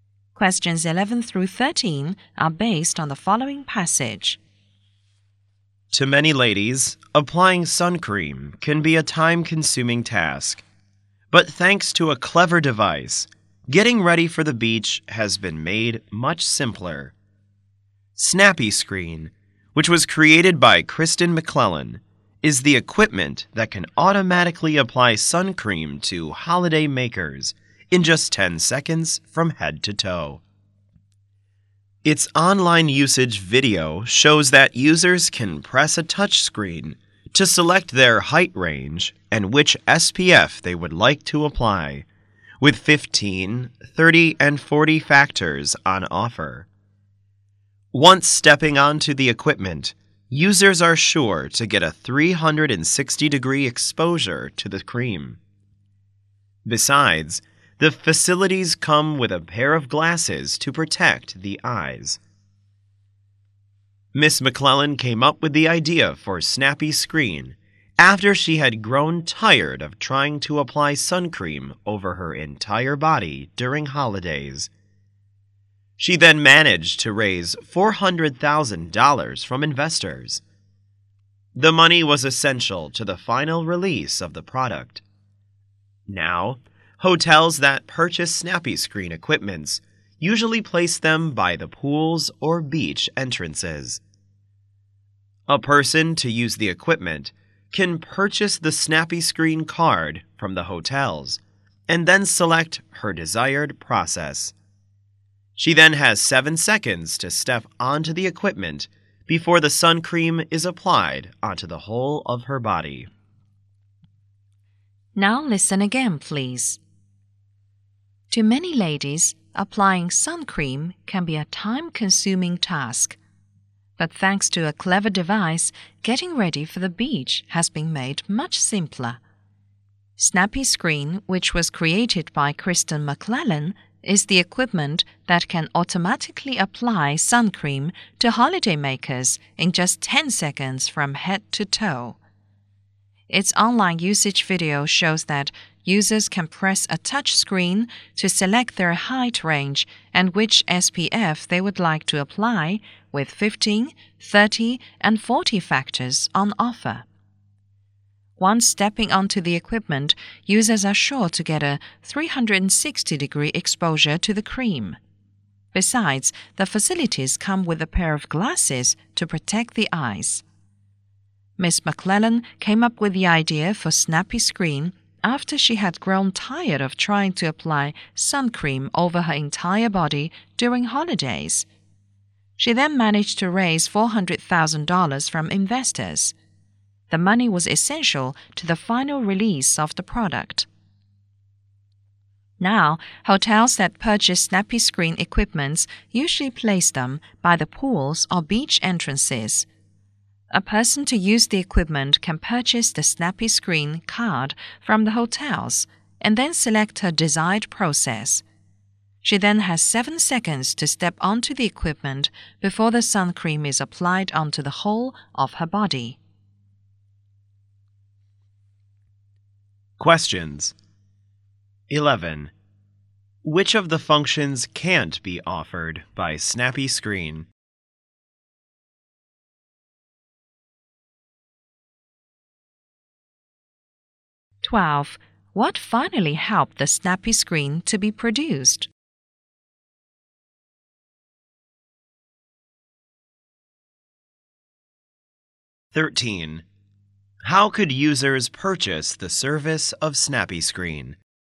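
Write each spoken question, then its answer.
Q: What finally helped the Snappy Screen to be produced?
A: The $400,000 raised from investors

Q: How could users purchase the service of Snappy Screen?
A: By buying a Snappy Screen card from the hotels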